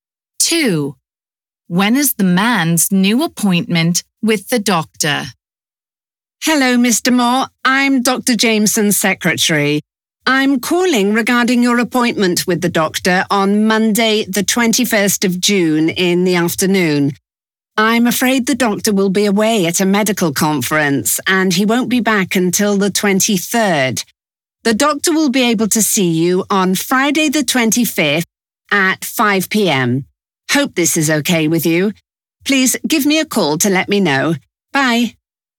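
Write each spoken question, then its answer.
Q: When is the man's new appointment with the doctor?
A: Friday the 25th at 5 p.m.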